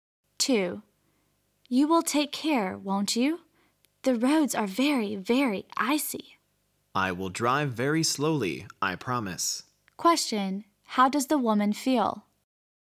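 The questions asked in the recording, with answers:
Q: How does the woman feel?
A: Worried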